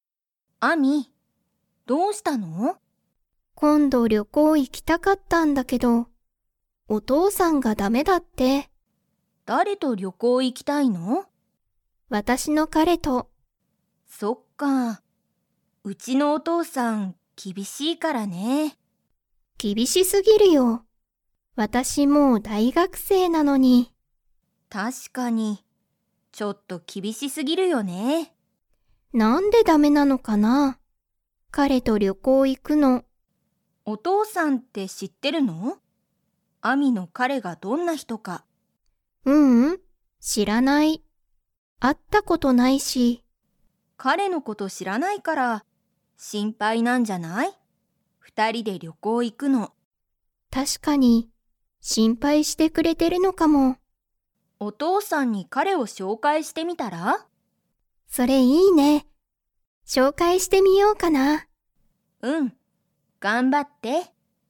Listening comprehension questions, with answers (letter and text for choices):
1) アミとカオリの は厳きびしい。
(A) お母かあさん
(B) お父とうさん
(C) 娘むすめ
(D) 息子むすこ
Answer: (B) お父とうさん

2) アミのお父とうさんは、アミの彼かれがどんな人ひとか知しっていますか?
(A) はい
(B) いいえ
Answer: (B) いいえ

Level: Level 3